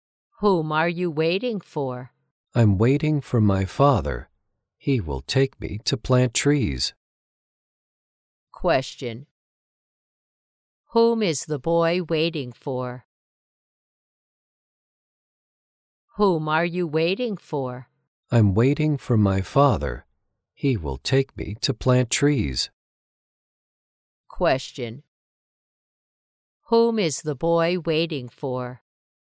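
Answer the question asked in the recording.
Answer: His father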